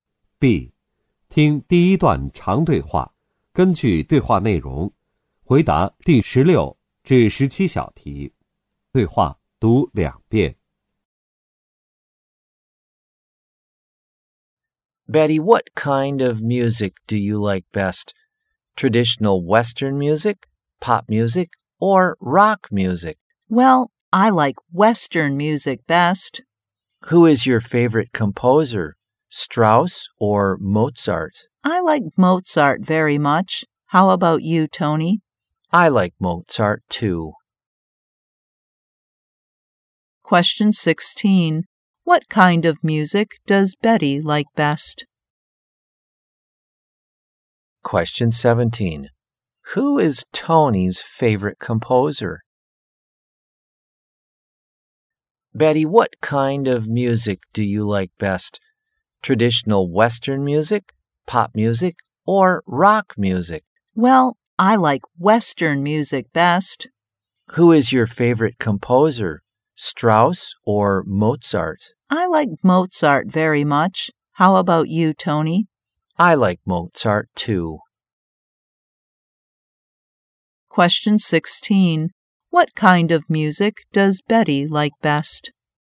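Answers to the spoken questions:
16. Western music
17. Mozart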